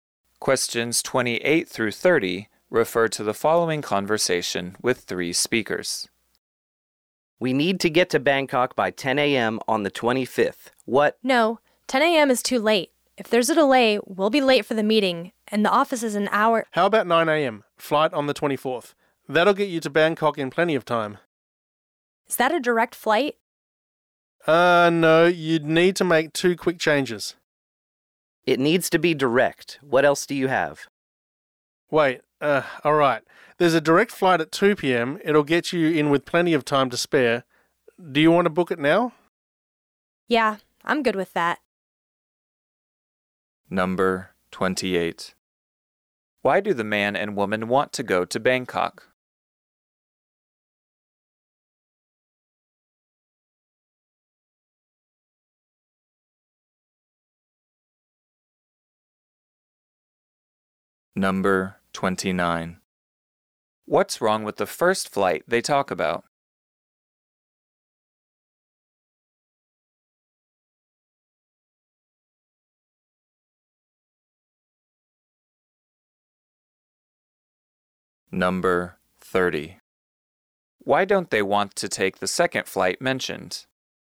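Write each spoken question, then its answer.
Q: Why do the man and woman want to go to Bangkok?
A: To attend a meeting

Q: What's wrong with the first flight they talk about?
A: It arrives too late (10 a.m.) if there is a delay

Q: Why don't they want to take the second flight mentioned?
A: It isn't direct; it needs two changes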